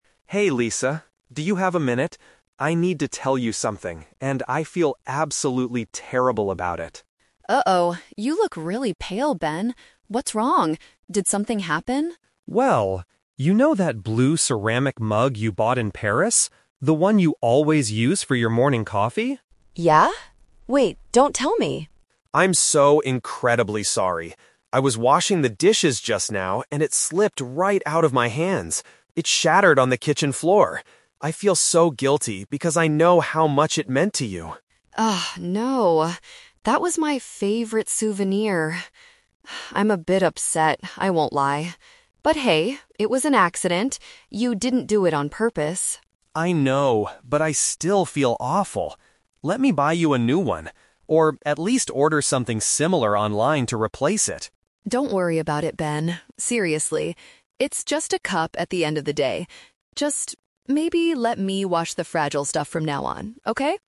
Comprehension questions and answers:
Listen to the conversation between two friends and choose the correct answer (A, B, or C) for each question.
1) What is the main reason Ben feels guilty?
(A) He forgot to wash Lisa's coffee cup.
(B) He accidentally destroyed Lisa's special souvenir.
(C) He lost some money while traveling in Paris.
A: He accidentally destroyed Lisa's special souvenir.

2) What does Ben offer to do to fix his mistake?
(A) Purchase a replacement on the internet.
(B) Glue the broken pieces back together.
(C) Buy her a completely different gift from Paris.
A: Purchase a replacement on the internet.

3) How does Lisa resolve the situation at the end?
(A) She asks Ben to pay for a new cup immediately.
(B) She suggests that she should wash delicate items herself.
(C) She decides to stop drinking coffee in the morning.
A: She suggests that she should wash delicate items herself.

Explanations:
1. Ben confesses that Lisa's mug "slipped right out of my hands" and "shattered" (which means destroyed). Lisa later calls it her "favorite souvenir." The Trap (A): The audio mentions "washing the dishes" and her "coffee", but Ben didn't forget to wash it; he broke it while washing it. The Trap (C): Paris is mentioned as the place where Lisa bought the mug, but Ben did not lose any money there.
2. Ben says, "Let me buy you a new one, or at least order something similar online to replace it." "Online" is a synonym for "on the internet." The Trap (B): This is a plausible action when something breaks, but Ben never mentions fixing or gluing the cup in the conversation. The Trap (C): Ben offers to buy something "similar" to replace it, not a "completely different gift," and he doesn't say he will go to Paris to get it.
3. At the end, Lisa says, "maybe let me wash the fragile stuff from now on." "Fragile stuff" is a paraphrase of "delicate items." The Trap (A): Ben offers to buy a new one, but Lisa rejects this idea by saying, "Don't worry about it, Ben. Seriously." She does not ask him to pay. The Trap (C): The audio mentions "morning coffee," but Lisa never says she will stop drinking it.

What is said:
Ben: Hey, Lisa. Do you have a minute? I need to tell you something, and I feel absolutely terrible about it.
Lisa: Uh oh, you look really pale, Ben. What's wrong? Did something happen?
Ben: Well... you know that blue ceramic mug you bought in Paris? The one you always use for your morning coffee?
Lisa: Yeah? Wait, don't tell me...
Ben: I'm so incredibly sorry. I was washing the dishes just now, and it slipped right out of my hands. It shattered on the kitchen floor. I feel so guilty because I know how much it meant to you.
Lisa: Oh, no... That was my favorite souvenir. (sighs) I'm a bit upset, I won't lie. But hey, it was an accident. You didn't do it on purpose.
Ben: I know, but I still feel awful. Let me buy you a new one, or at least order something similar online to replace it.
Lisa: Don't worry about it, Ben. Seriously. It's just a cup at the end of the day. Just... maybe let me wash the fragile stuff from now on, okay?

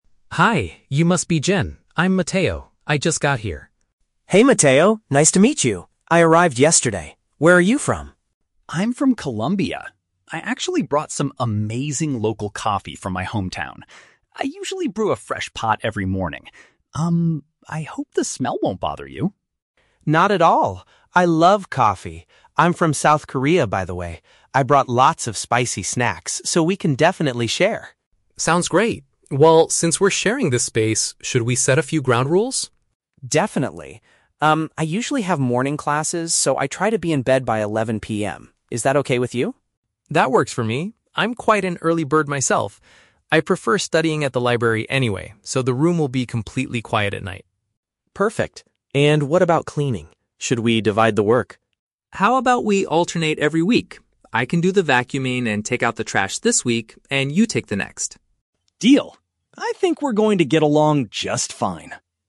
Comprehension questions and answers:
Listen to the conversation between two international students moving into their dormitory. Read the questions below and choose the correct answer (A, B, or C) for each.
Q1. Why is Mateo slightly concerned about his morning routine?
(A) He makes a lot of noise when he wakes up early.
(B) He is worried the aroma of his daily drink might annoy Jin.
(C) He does not know how to use the shared kitchen appliances.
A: He is worried the aroma of his daily drink might annoy Jin.

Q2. Why does Jin want to go to sleep by 11 PM?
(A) He has to attend lessons early the next day.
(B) He prefers to study at the campus library late at night.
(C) He needs to wake up early to call his family in South Korea.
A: He has to attend lessons early the next day.

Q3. How do the two roommates agree to handle the cleaning?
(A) Mateo will do the vacuuming while Jin takes out the trash.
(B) They will take turns doing the household chores on a weekly basis.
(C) They will clean the room together every weekend.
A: They will take turns doing the household chores on a weekly basis.

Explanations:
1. The Key (Correct): Mateo says he brews coffee every morning and hopes "the smell won't bother you." (Paraphrased: smell = aroma, bother = annoy, coffee = daily drink). The Trap: Option (A) is plausible because he says he is an "early bird," but he never mentions making noise. Not mentioned: Option (C) is not mentioned at all.
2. The Key (Correct): Jin states, "I usually have morning classes, so I try to be in bed by 11 PM." (Paraphrased: morning classes = attend lessons early). The Trap: Option (B) is incorrect because it is Mateo, not Jin, who says "I prefer studying at the library." Not mentioned: Option (C) sounds like a logical reason for an international student, but calling family is not mentioned in the audio.
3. The Key (Correct): Mateo suggests they "alternate every week," which means to "take turns... on a weekly basis." The Trap: Option (A) is incorrect because Mateo offers to do both vacuuming and taking out the trash for the first week, not permanently split the tasks this way. Not mentioned: Option (C) is plausible, but they agree to alternate weeks, not clean together on weekends.

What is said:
Mateo: Hi, you must be Jin. I'm Mateo. I just got here.
Jin: Hey Mateo, nice to meet you. I arrived yesterday. Where are you from?
Mateo: I'm from Colombia. I actually brought some amazing local coffee from my hometown. I usually brew a fresh pot every morning. Um, I hope the smell won't bother you.
Jin: Not at all! I love coffee. I'm from South Korea, by the way. I brought lots of spicy snacks, so we can definitely share.
Mateo: Sounds great. Well, since we're sharing this space, should we set a few ground rules?
Jin: Definitely. Umm, I usually have morning classes, so I try to be in bed by 11 PM. Is that okay with you?
Mateo: That works for me. I'm quite an early bird myself. I prefer studying at the library anyway, so the room will be completely quiet at night.
Jin: Perfect. And what about cleaning? Should we divide the work?
Mateo: How about we alternate every week? I can do the vacuuming and take out the trash this week, and you take the next?

